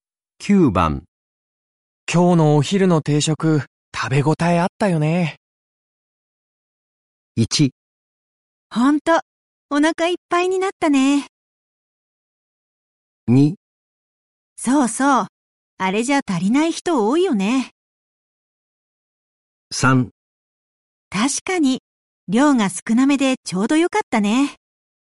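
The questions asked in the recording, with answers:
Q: 今日のお昼の定食、食べ応えあったよね。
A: 1: ほんと、お腹いっぱいになったね。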